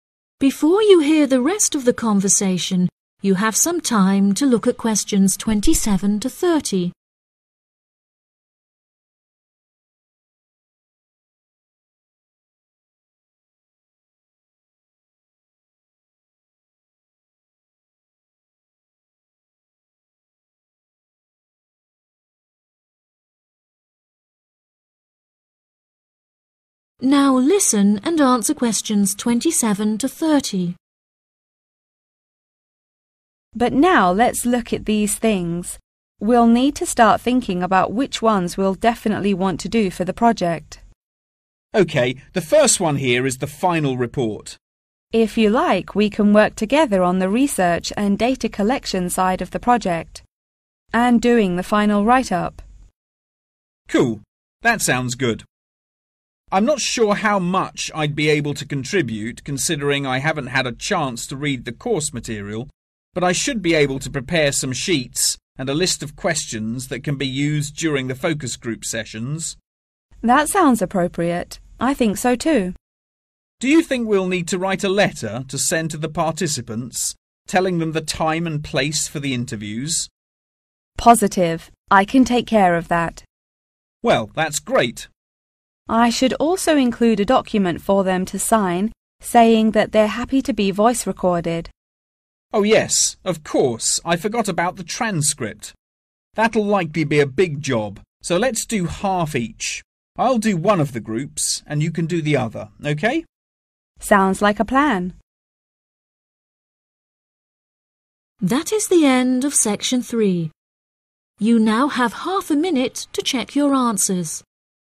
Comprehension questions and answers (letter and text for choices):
Write the correct letter, A, B or C, next to questions 27-30.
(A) Jane will do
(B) Douglas will do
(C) They will do together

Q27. final report.................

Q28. sheet preparation.................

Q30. transcript.................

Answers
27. (C) They will do together
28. (B) Douglas will do
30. (C) They will do together